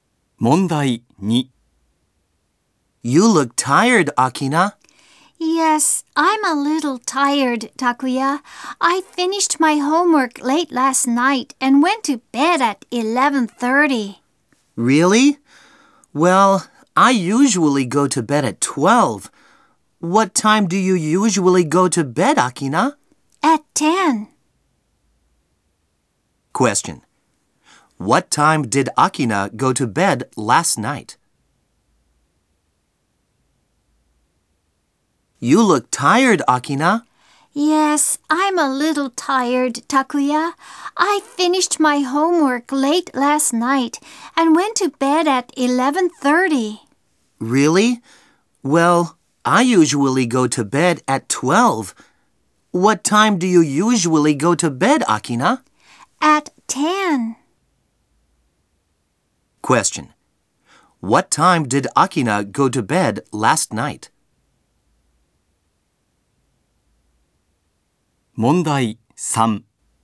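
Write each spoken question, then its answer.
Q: What time did Akina go to bed last night?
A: At 11:30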